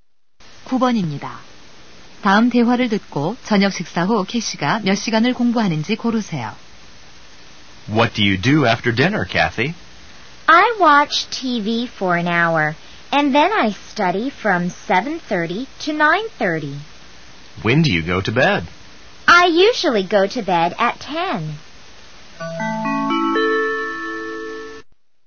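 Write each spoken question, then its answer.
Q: 다음 대화를 듣고 저녁 식사 후 캐시가 몇 시간을 공부하는지 고르세요.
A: 2시간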